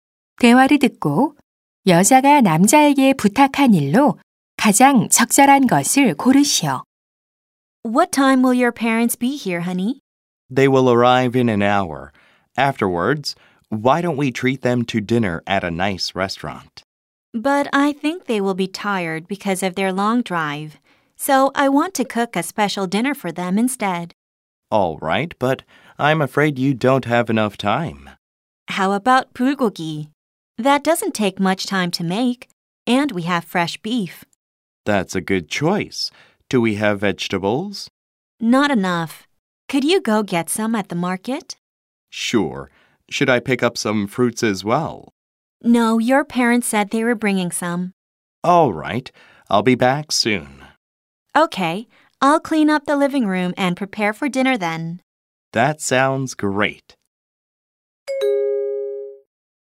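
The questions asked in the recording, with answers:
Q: 대화를 듣고 여자가 남자에게 부탁한 일로 가장 적절한 것을 고르시오.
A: 시장에 가서 채소 사 오기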